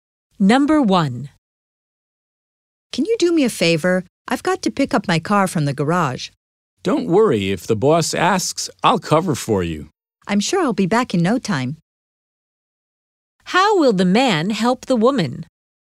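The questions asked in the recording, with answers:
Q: How will the man help the woman?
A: He'll cover for her if the boss asks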